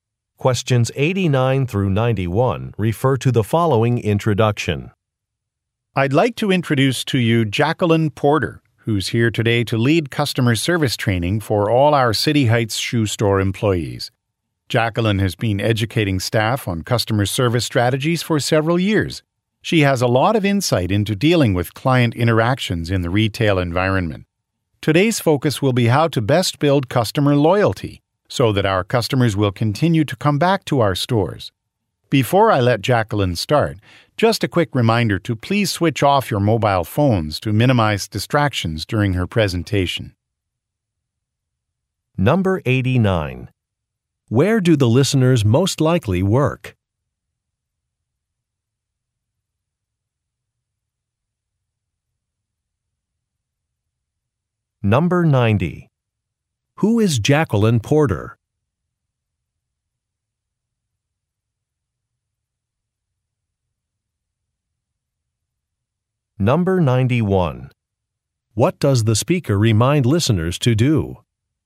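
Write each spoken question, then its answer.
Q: Where do the listeners most likely work?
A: At a shoe store

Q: Who is Jacqueline Porter?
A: A customer service trainer

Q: What does the speaker remind listeners to do?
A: Turn off their mobile phones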